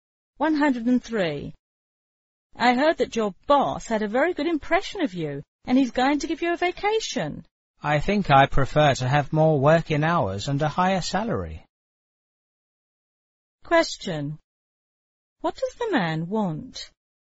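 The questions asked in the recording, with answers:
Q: What does the man want?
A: More working hours and a higher salary.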